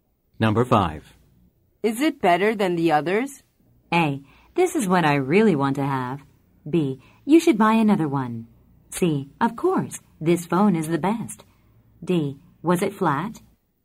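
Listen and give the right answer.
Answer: C: Of course, this phone is the best.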